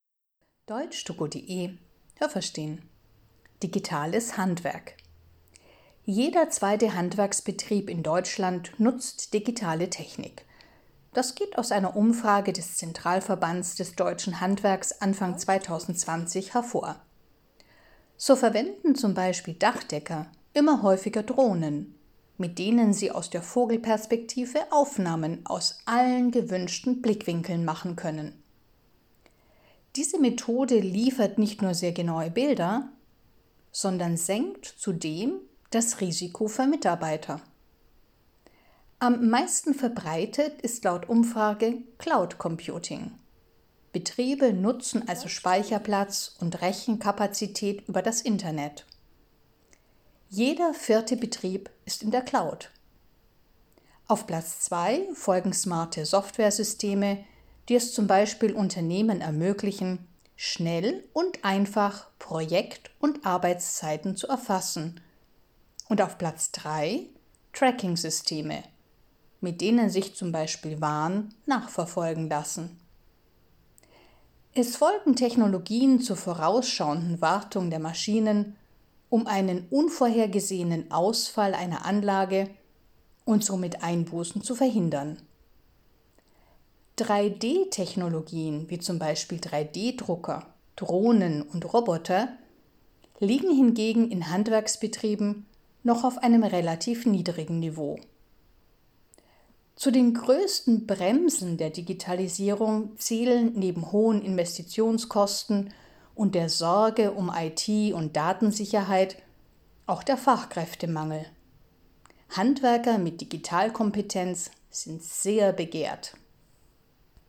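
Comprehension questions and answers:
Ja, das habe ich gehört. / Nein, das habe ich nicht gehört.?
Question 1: Die Hälfte der Handwerksbetriebe nutzt digitale Technik.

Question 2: Der Beruf des Dachdeckers verschwindet, weil immer häufiger Drohnen diese Arbeit übernehmen.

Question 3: 25 Prozent aller Handwerksbetriebe mieten z.B. Speicherplatz und Rechenleistung in der sogenannten „Cloud".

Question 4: Häufig werden auch Systeme verwendet, mit denen finanziell angeschlagene Firmen ihre Maschinen vorausschauend kontrollieren können.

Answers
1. Ja, das habe ich gehört.
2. Nein, das habe ich nicht gehört.
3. Ja, das habe ich gehört.
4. Nein, das habe ich nicht gehört.

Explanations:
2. Drohnen unterstützen die Arbeit der Dachdecker. Mit ihrer Hilfe kann man den Zustand eines Dachs genau untersuchen, ohne dass Menschen auf das Dach klettern müssen.
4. Man verwendet Systeme, mit denen man Maschinen vorausschauend kontrolliert. 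So kann man erreichen, dass kein finanzieller Verlust entsteht, weil man Probleme bereits im Vorfeld erkennt.

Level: C2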